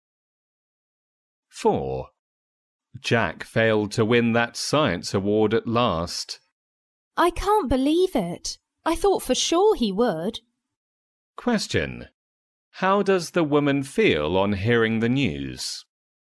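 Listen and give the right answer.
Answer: Surprised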